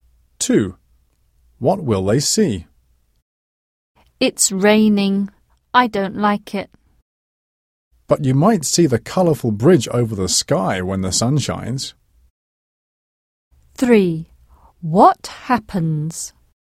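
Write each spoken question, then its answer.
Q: What will they see?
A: a rainbow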